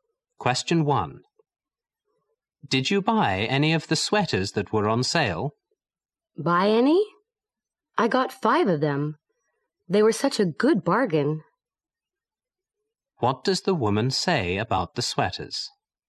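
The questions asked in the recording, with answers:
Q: What does the woman say about the sweaters?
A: She bought five because they were a good bargain.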